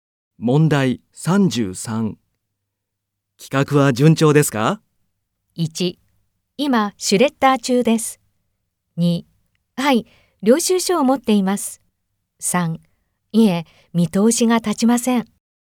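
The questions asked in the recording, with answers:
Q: 企画は順調ですか?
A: 3: いえ、見通しが立ちません。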